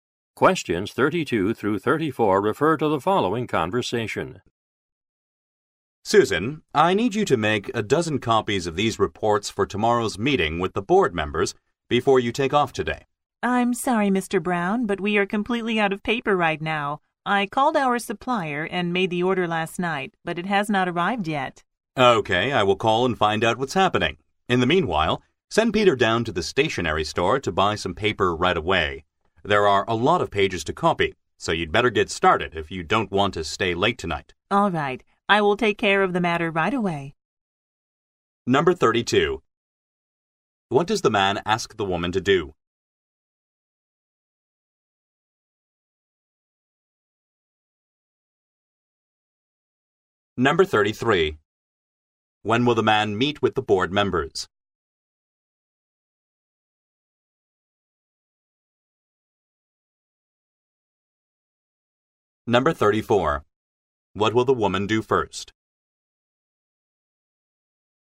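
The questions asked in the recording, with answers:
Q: What does the man ask the woman to do?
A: Make copies of the reports

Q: When will the man meet with the board members?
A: Tomorrow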